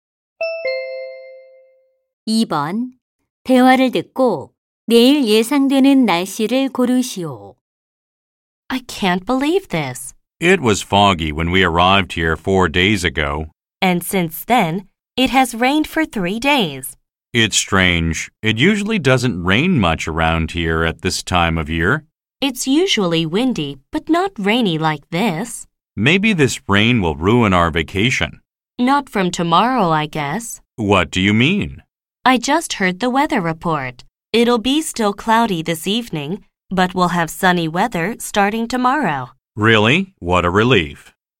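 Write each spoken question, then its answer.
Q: 대화를 듣고 내일 예상되는 날씨를 고르시오.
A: 맑음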